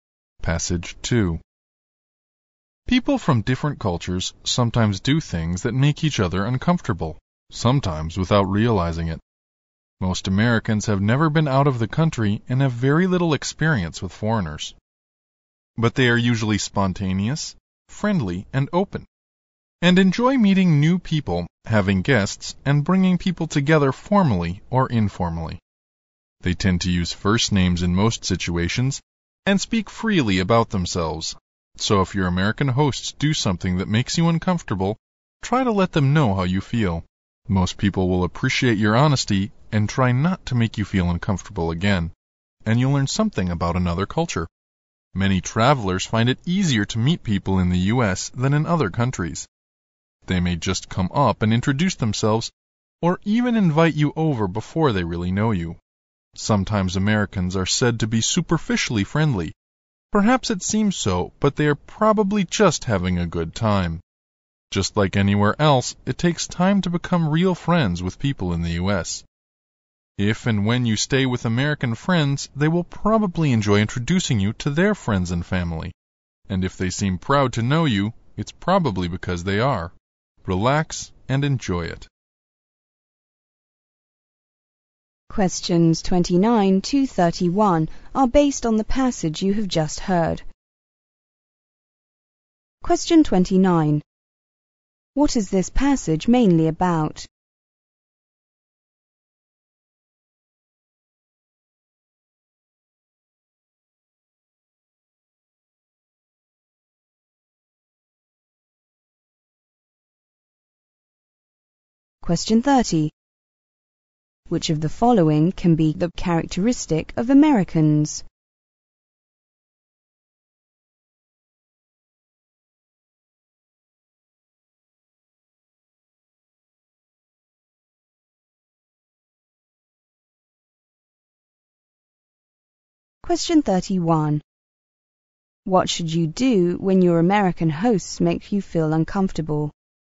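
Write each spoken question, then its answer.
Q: What should you do when your American hosts make you feel uncomfortable?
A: Let them know how you feel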